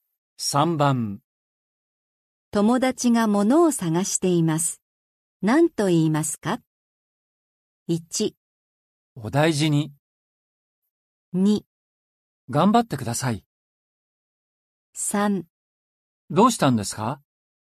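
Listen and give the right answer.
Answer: 3: どうしたんですか?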